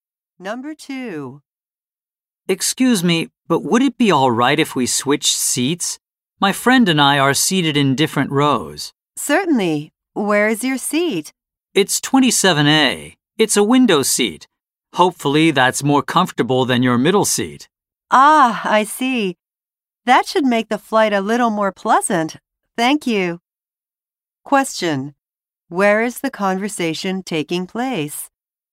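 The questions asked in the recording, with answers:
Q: Where is the conversation taking place?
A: On an airplane.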